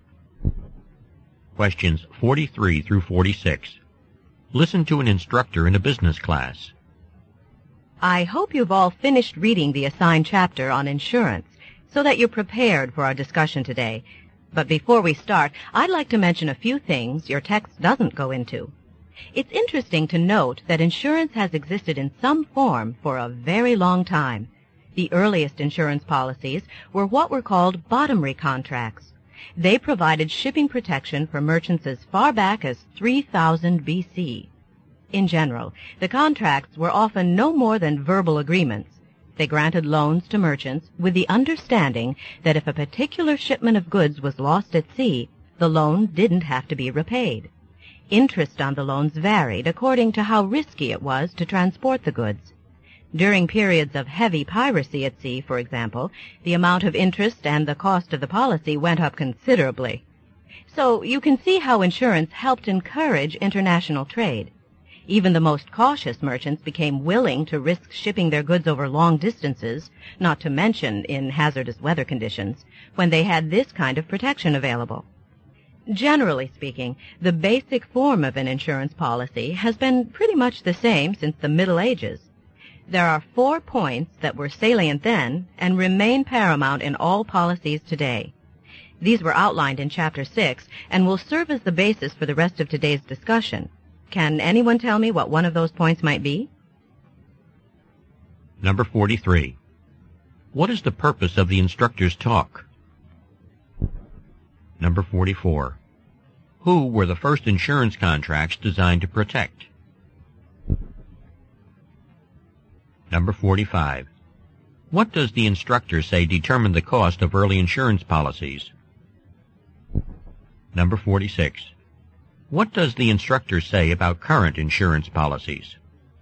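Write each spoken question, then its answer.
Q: What is the purpose of the instructor's talk?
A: To give historical background on insurance

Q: Who were the first insurance contracts designed to protect?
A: Merchants shipping goods

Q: What does the instructor say determined the cost of early insurance policies?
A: How risky it was to transport the goods

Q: What does the instructor say about current insurance policies?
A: Their basic form is much the same as in the Middle Ages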